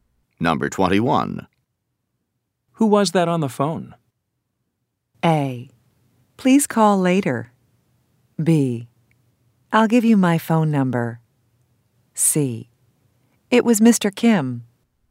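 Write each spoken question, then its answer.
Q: Who was that on the phone?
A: C: It was Mr. Kim.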